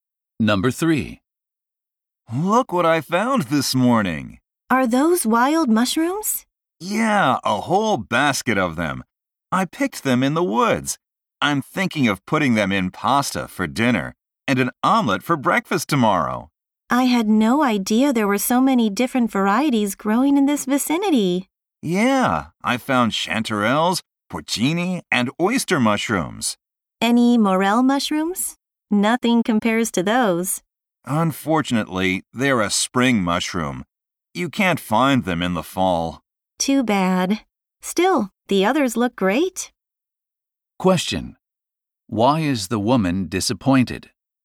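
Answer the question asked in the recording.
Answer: Morel mushrooms can't be found in the fall.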